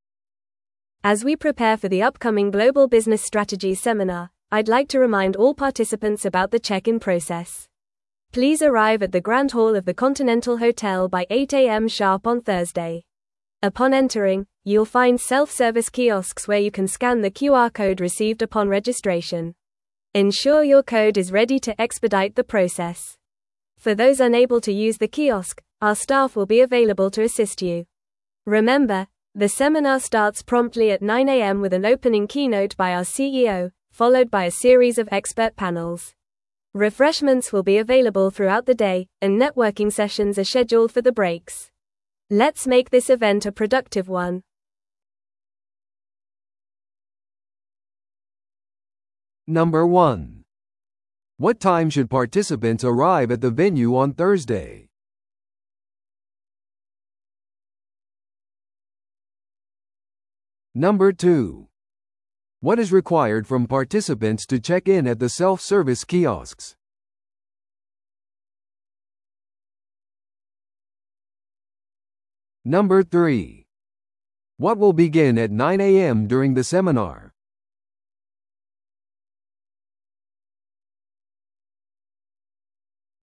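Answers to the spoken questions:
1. By 8 a.m.
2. Scanning the QR code received upon registration
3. An opening keynote by the CEO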